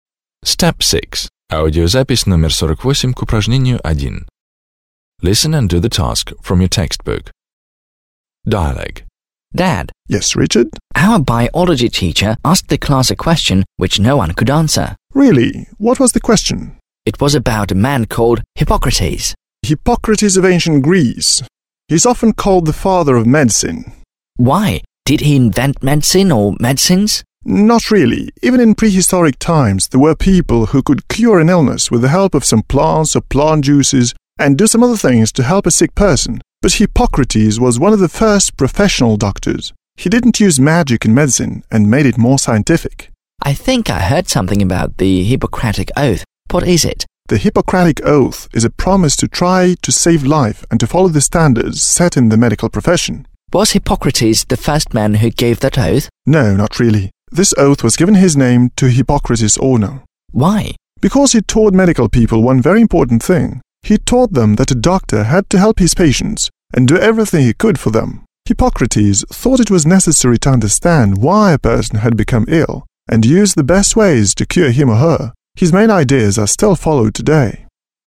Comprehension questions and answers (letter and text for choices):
Listen to the dialogue between Richard and his father, (48), and complete the sentences (1-4).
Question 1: Richard's classmates didn't know what Hippocrates' occupation was.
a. didn't know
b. knew very well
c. were not sure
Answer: a. didn't know

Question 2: Hippocrates was a great doctor.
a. inventor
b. explorer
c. doctor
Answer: c. doctor

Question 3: The Hippocratic oath was named after Hippocrates.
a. was created by Hippocrates himself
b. was written by Hippocrates and his pupils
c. was named after Hippocrates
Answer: c. was named after Hippocrates

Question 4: Hippocrates was famous because he had taught medical people how to help sick people.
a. had saved thousands of his pupils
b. had invented new medicines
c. had taught medical people how to help sick people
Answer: c. had taught medical people how to help sick people

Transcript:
− Our Biology teacher asked the class a question, which no one could answer.
− Really? What was the question? − Правда? Какой вопрос?
− Hippocrates of Ancient Greece... He is often called the father of medicine.
− Why? Did he invent medicine... or medicines?
− Not really. Even in prehistoric times there were people who could cure an illness with the help of some plants or plant juices and do some other things to help a sick person. But Hippocrates was one of the first professional doctors. He didn't use magic in medicine and made it more scientific.
− I think, I've heard something about the Hippocratic oath. What is it?
− The Hippocratic oath is a promise to try to save life and to follow the standards set in the medical profession.
− Was Hippocrates the first man who gave that oath?
− No, not really. This oath was given his name to honour Hippocrates.
− Because he taught medical people one very important thing; he taught them that a doctor had to help his patients and do everything he could for them. Hippocrates thought it was necessary to understand why a person had become ill and use the best ways to cure him or her. His main ideas are still followed today.

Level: 9 класс